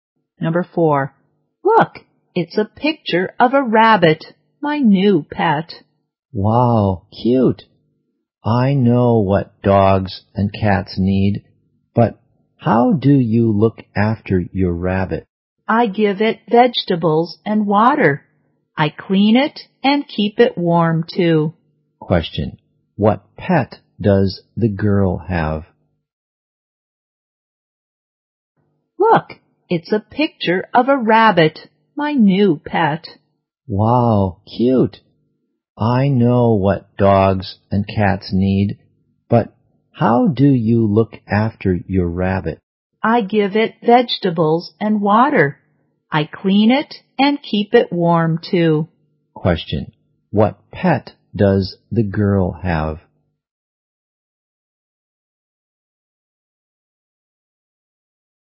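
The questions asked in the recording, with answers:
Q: what pet does the girl have?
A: A rabbit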